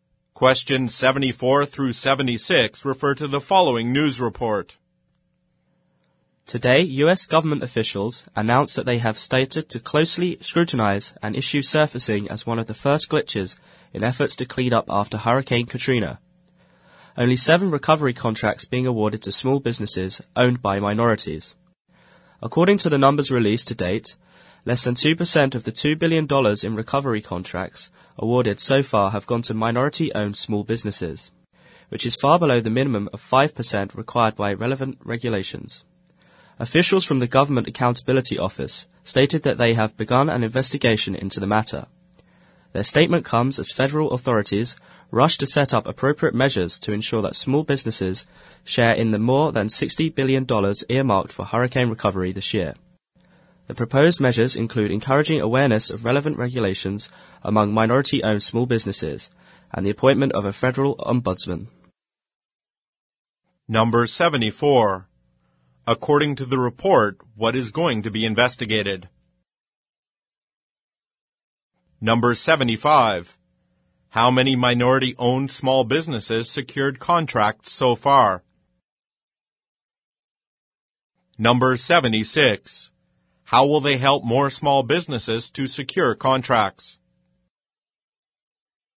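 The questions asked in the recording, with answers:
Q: According to the report, what is going to be investigated?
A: Why so few hurricane recovery contracts went to minority-owned small businesses

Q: How will they help more small businesses to secure contracts?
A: By raising awareness of the regulations and appointing a federal ombudsman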